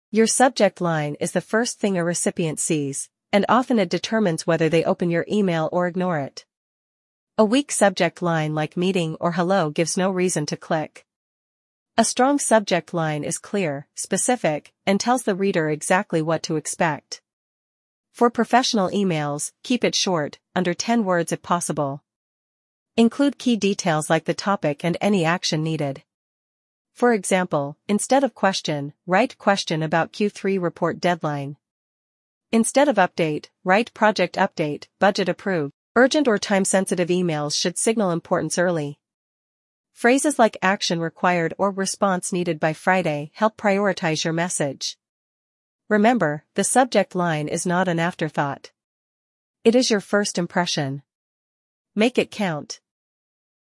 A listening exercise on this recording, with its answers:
Complete the phrases as you listen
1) Your subject line is the ______ thing a recipient sees.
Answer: first

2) A weak subject line like 'Meeting' or '______' gives no reason to click.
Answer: Hello

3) A strong subject line is clear, specific, and tells the reader exactly what to ______.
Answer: expect

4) For professional emails, keep it ______, under ten words if possible.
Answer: short

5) Include key details like the ______ and any action needed.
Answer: topic

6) Urgent or time-sensitive emails should signal ______ early.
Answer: importance

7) Remember, the subject line is not an afterthought. It is your first ______. Make it count.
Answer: impression

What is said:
Your subject line is the first thing a recipient sees, and often it determines whether they open your email or ignore it. A weak subject line like "Meeting" or "Hello" gives no reason to click. A strong subject line is clear, specific, and tells the reader exactly what to expect.
For professional emails, keep it short, under ten words if possible. Include key details like the topic and any action needed. For example, instead of "Question," write "Question about Q3 Report Deadline." Instead of "Update," write "Project Update: Budget Approved."
Urgent or time-sensitive emails should signal importance early. Phrases like "Action Required" or "Response Needed by Friday" help prioritize your message.
"Remember, the subject line is not an afterthought. It is your first impression. Make it count."